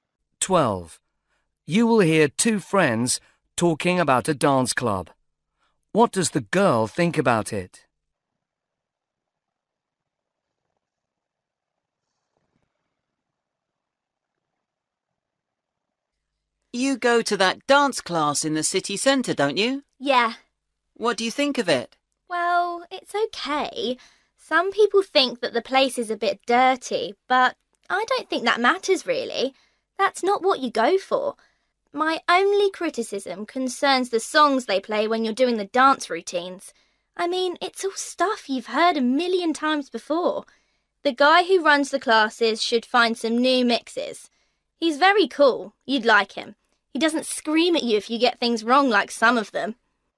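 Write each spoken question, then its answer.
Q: What does the girl think about it?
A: The music they play is old and overplayed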